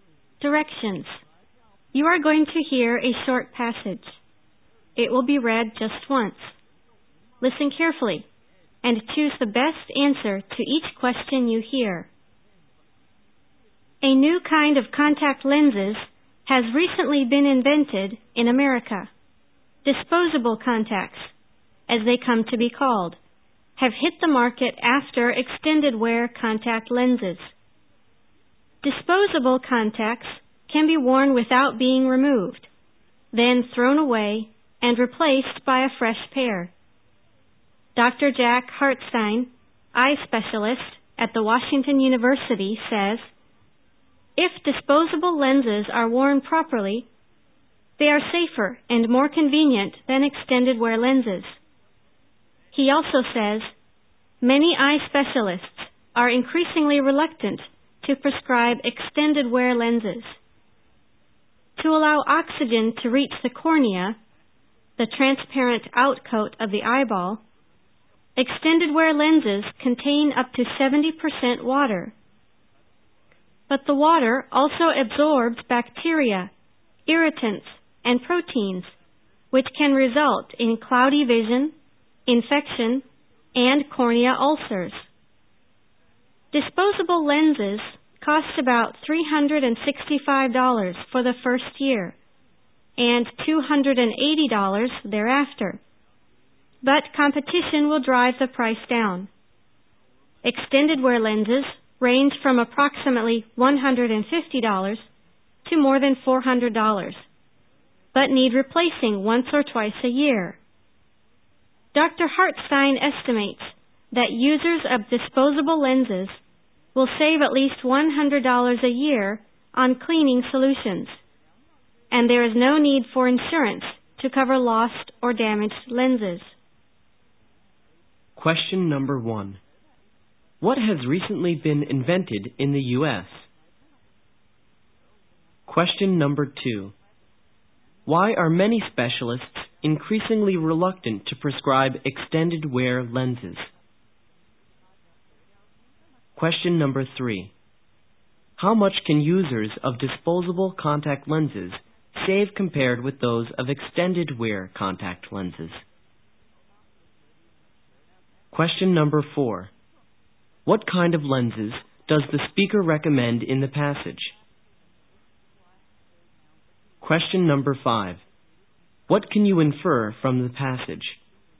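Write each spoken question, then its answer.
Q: What has recently been invented in the U.S.?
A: Disposable contact lenses

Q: Why are many specialists increasingly reluctant to prescribe extended wear lenses?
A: Their water absorbs bacteria, irritants and proteins, which can cause cloudy vision, infection and cornea ulcers

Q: How much can users of disposable contact lenses save compared with those of extended wear contact lenses?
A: At least $100 a year on cleaning solutions

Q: What kind of lenses does the speaker recommend in the passage?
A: Disposable contact lenses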